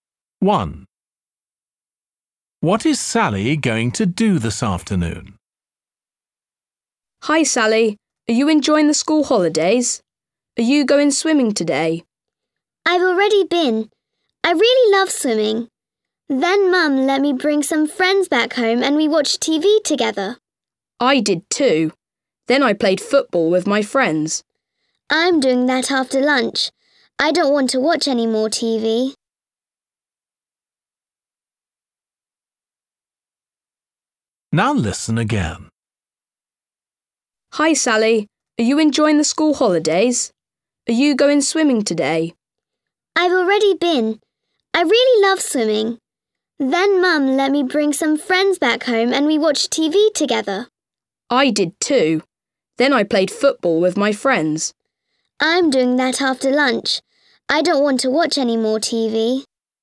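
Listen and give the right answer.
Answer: play football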